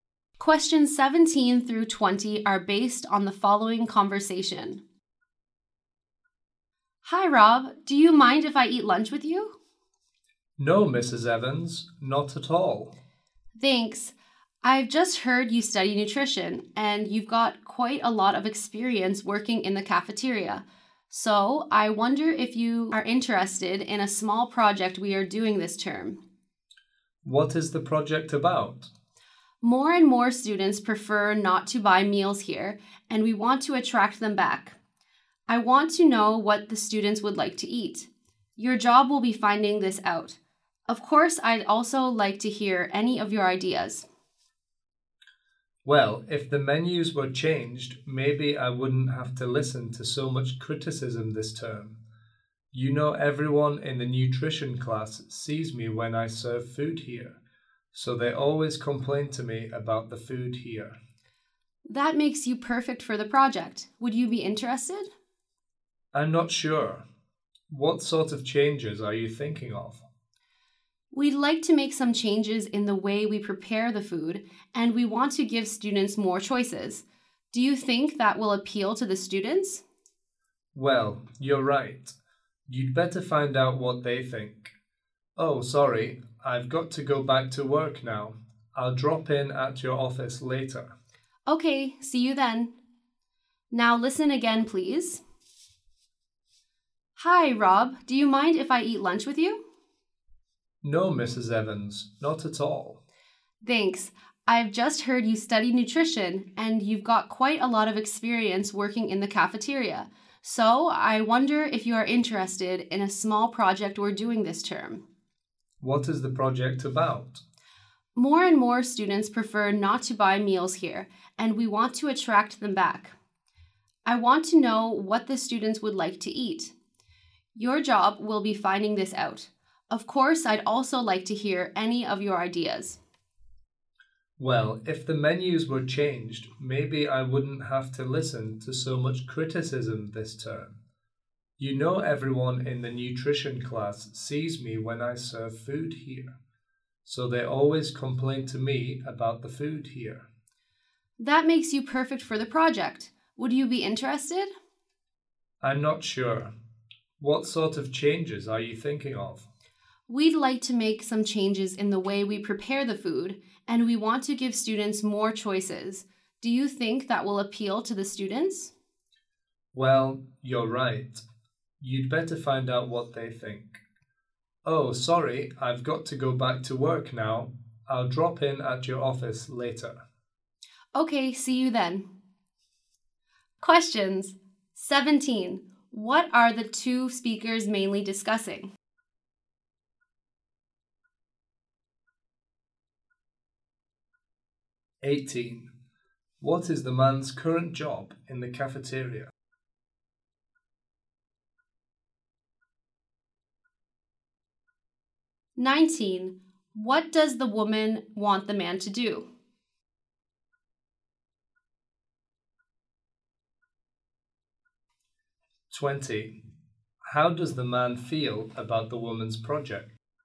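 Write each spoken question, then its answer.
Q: What are the two speakers mainly discussing?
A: A project to improve the cafeteria food

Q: What is the man's current job in the cafeteria?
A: Serving food

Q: What does the woman want the man to do?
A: Find out what students would like to eat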